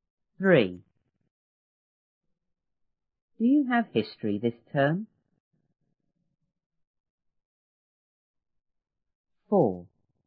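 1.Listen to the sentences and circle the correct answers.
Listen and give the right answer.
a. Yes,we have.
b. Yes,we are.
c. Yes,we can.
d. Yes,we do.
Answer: d. Yes,we do.

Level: 初中英语广州版1B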